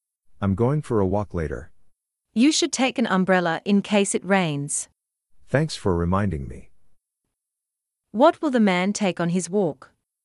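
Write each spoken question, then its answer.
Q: What will the man take on his walk?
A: An umbrella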